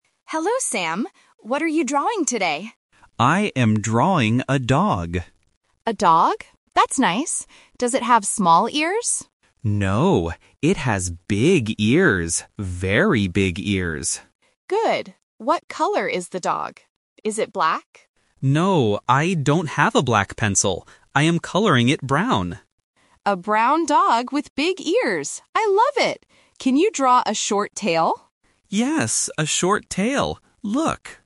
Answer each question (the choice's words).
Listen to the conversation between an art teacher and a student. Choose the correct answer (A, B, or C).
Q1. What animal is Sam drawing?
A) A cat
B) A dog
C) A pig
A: A dog

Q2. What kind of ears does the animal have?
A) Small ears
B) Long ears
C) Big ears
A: Big ears

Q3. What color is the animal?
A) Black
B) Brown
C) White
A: Brown

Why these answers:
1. Sam clearly says, "I am drawing a dog." Option A (A cat) and Option C (A pig) are just other basic animals but are not mentioned in the audio.
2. The teacher asks, "Does it have small ears?" but Sam answers, "No, it has big ears." Option A (Small ears) is the trap because the teacher mentions it first. Option B (Long ears) is plausible for a dog but not mentioned.
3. Sam says, "I am coloring it brown." Option A (Black) is the trap because the teacher asks, "Is it black?" and Sam says he doesn't have a black pencil. Option C (White) is not mentioned.

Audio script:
Teacher: Hello, Sam. What are you drawing today?
Sam: I am drawing a dog.
Teacher: A dog? That's nice. Does it have small ears?
Sam: No, it has big ears. Very big ears.
Teacher: Good. What color is the dog? Is it black?
Sam: No, I don't have a black pencil. I am coloring it brown.
Teacher: A brown dog with big ears. I love it! Can you draw a short tail?

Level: A1